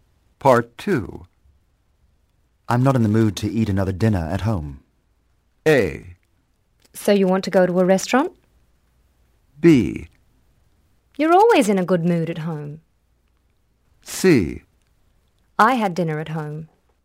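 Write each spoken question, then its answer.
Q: I'm not in the mood to eat another dinner at home.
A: A: So you want to go to a restaurant?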